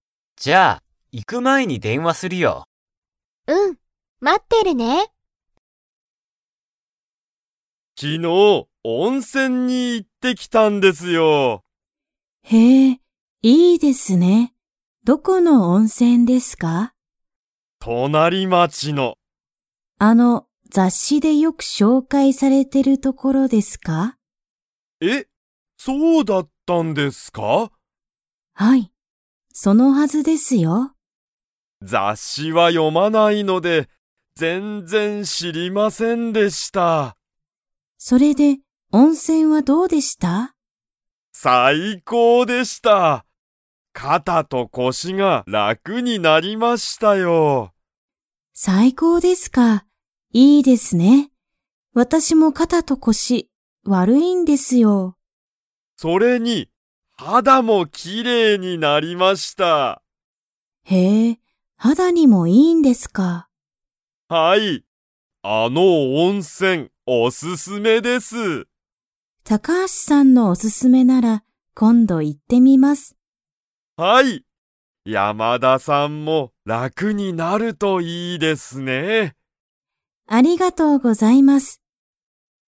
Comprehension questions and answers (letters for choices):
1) 雑誌ざっしで、何なにが紹介しょうかいされていましたか?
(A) 隣町となりまち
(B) 温泉おんせん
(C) レストラン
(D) 映画えいが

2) 高橋たかはしさんが行いった温泉おんせんは、肌はだに 。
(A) いい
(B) よくない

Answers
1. B
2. A

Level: Level 4